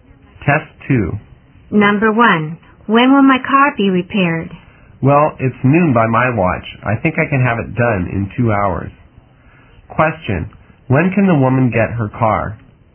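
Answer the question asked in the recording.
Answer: At 2 o'clock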